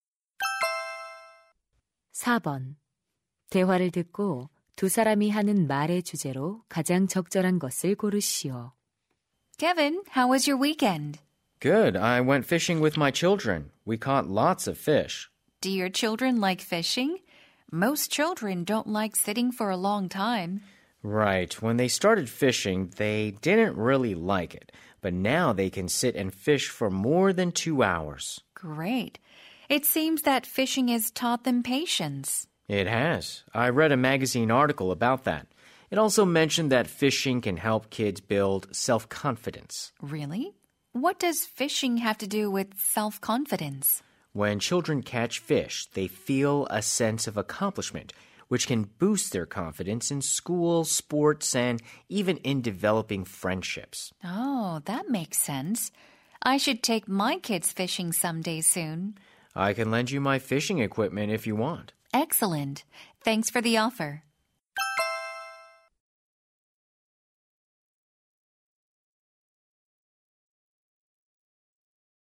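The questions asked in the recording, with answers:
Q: 대화를 듣고 두 사람이 하는 말의 주제로 가장 적절한 것을 고르시오.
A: 낚시가 아이들에게 주는 이점(인내심, 자신감)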